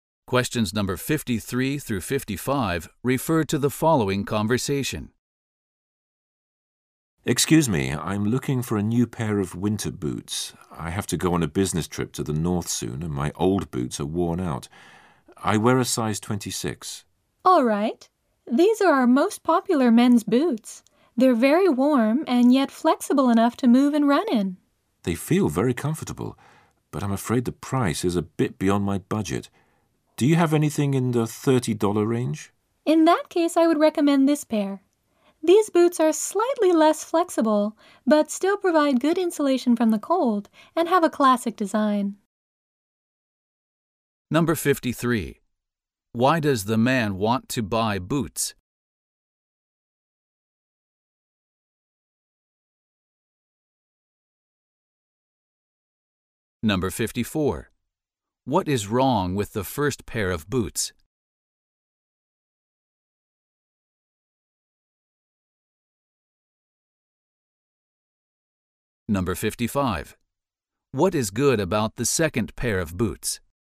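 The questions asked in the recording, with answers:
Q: Why does the man want to buy boots?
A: He is going on a business trip to the north and his old boots are worn out.

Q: What is wrong with the first pair of boots?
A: They are too expensive for his budget.

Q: What is good about the second pair of boots?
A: They provide good insulation from the cold and have a classic design.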